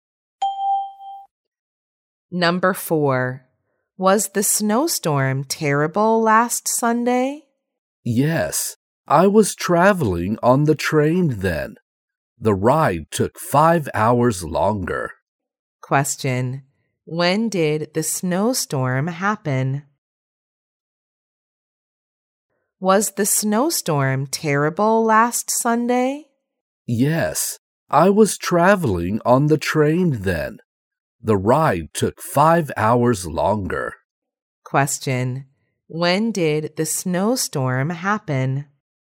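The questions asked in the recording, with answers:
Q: When did the snowstorm happen?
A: Last Sunday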